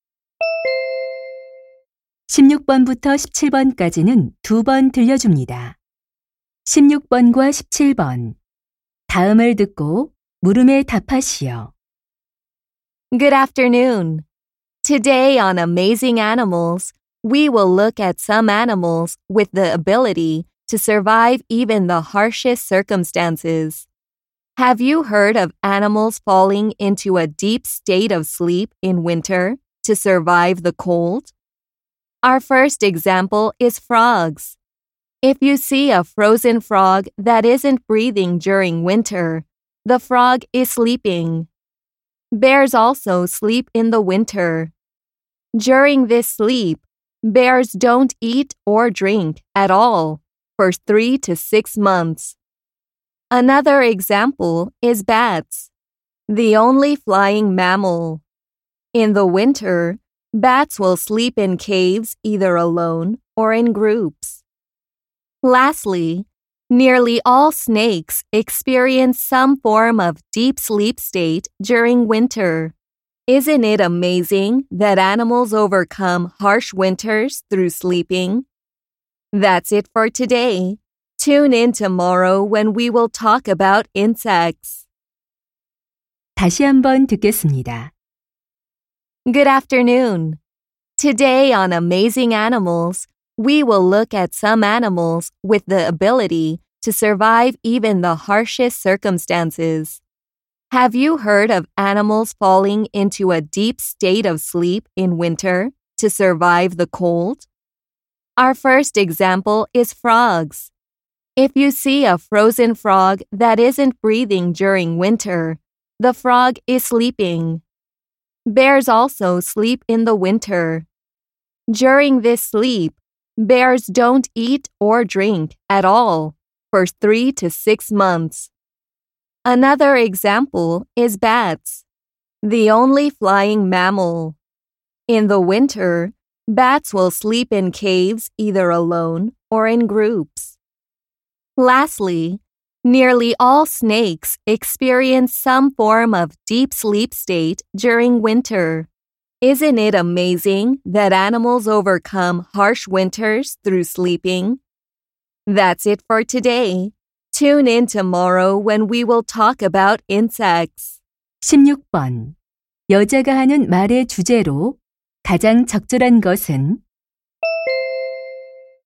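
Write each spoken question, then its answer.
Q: 여자가 하는 말의 주제로 가장 적절한 것은?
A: 겨울잠을 자며 혹독한 겨울을 이겨내는 동물들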